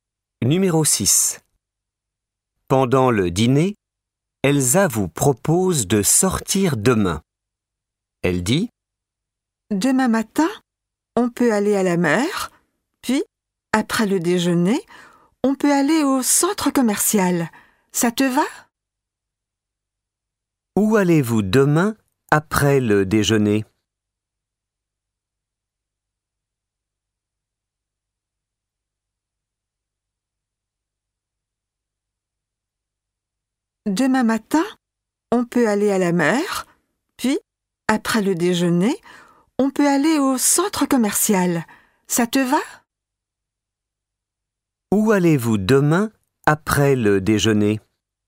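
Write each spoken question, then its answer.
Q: Où allez-vous demain après le déjeuner ?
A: Au centre commercial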